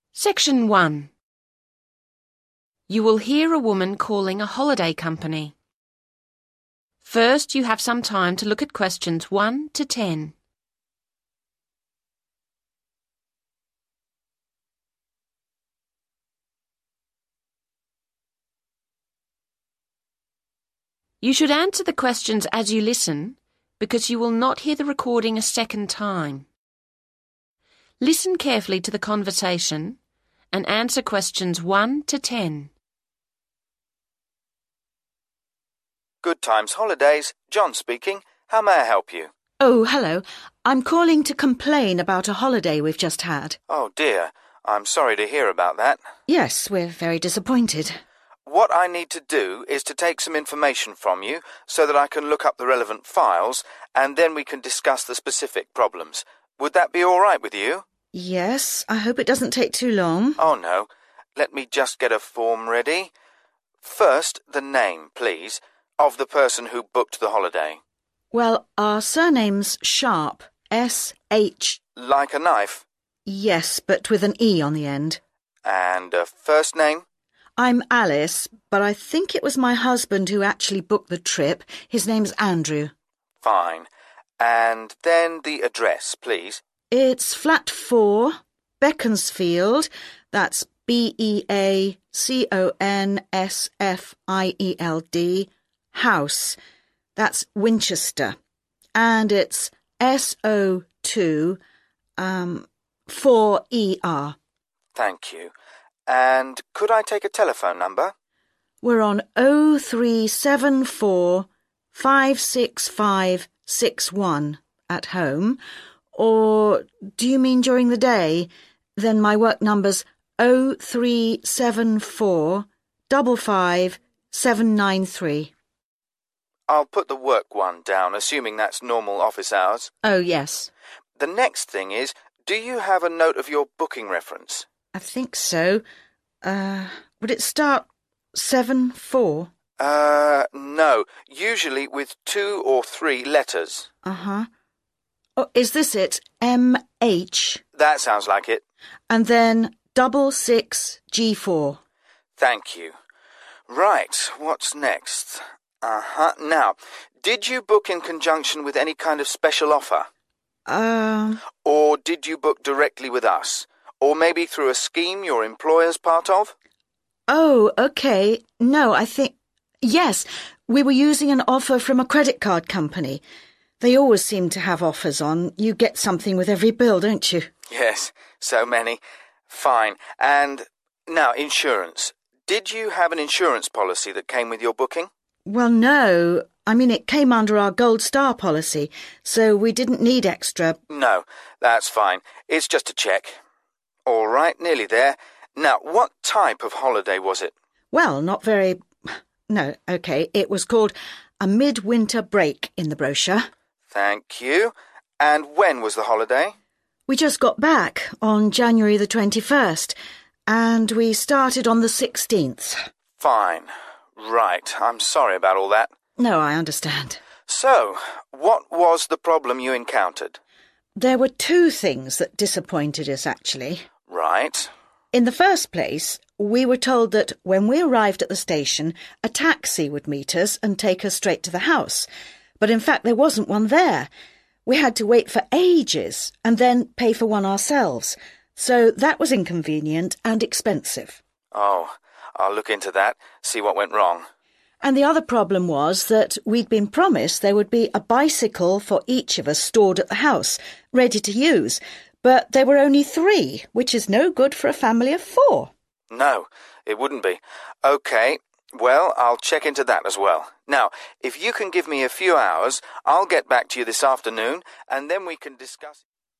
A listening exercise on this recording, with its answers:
Complete the notes below. Write NO MORE THAN TWO WORDS AND/ OR A NUMBER for each answer.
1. Holiday booked in name of: (1)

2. Address: Flat 4, (2) Winchester S024ER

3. Daytime telephone number: (3)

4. Booking reference: (4)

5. Special offer? Yes, from (5) company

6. Insurance? Yes, had (6) Policy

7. Type of holiday booked: (7) Break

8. Date holiday commenced: (8)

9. Details of complaint: no (9) at station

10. and a (10) was missing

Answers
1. Andrew Sharpe
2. beaconsfield house
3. 037455793
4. MH66G4
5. credit card
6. gold star
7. mid-winter
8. 16 january
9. taxi
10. bicycle